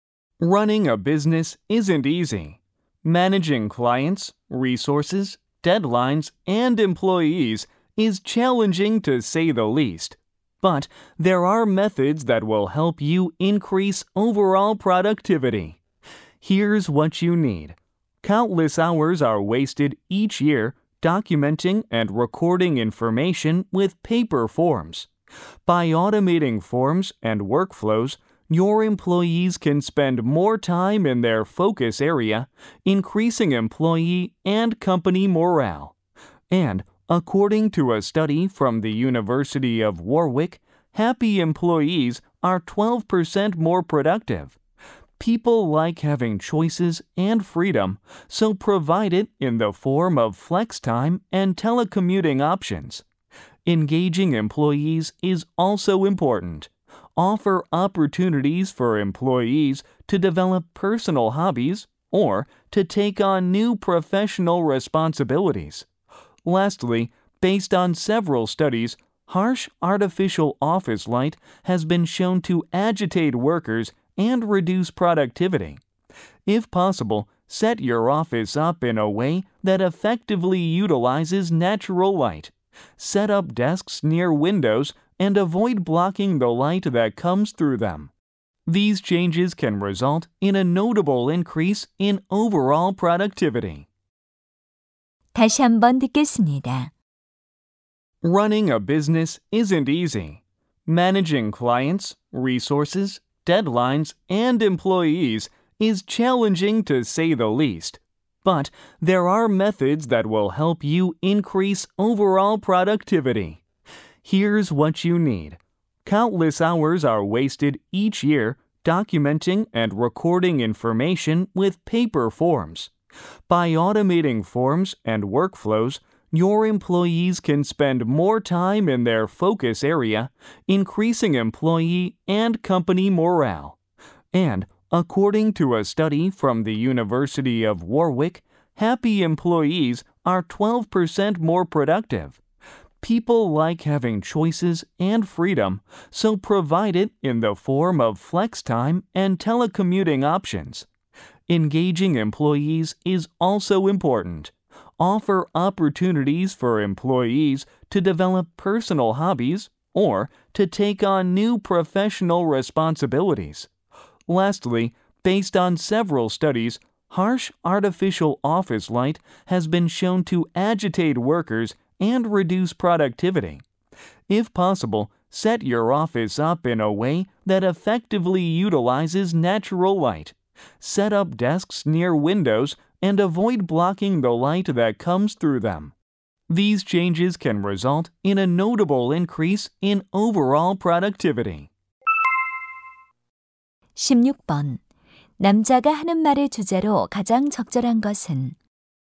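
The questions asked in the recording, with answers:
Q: 남자가 하는 말의 주제로 가장 적절한 것은?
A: 업무 생산성을 높이는 방법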